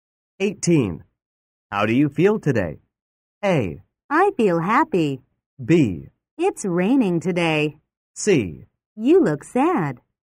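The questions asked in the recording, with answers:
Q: How do you feel today?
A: A: I feel happy.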